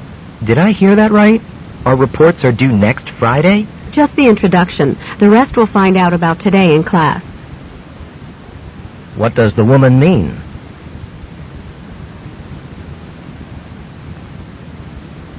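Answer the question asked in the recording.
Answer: Only the introduction is due next Friday.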